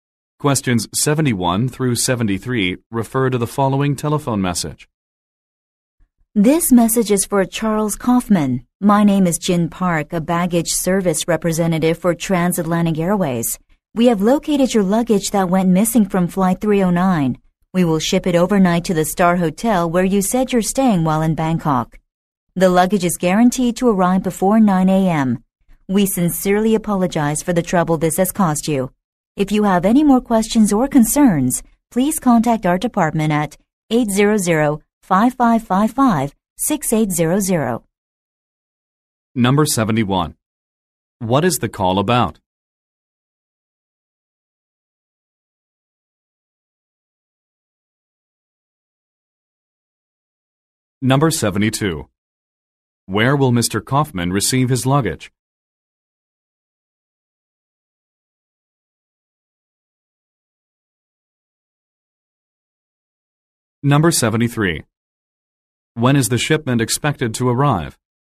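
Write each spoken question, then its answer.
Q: What is the call about?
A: His missing luggage has been found

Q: Where will Mr. Kaufman receive his luggage?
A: At the Star Hotel in Bangkok

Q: When is the shipment expected to arrive?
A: Before 9 a.m.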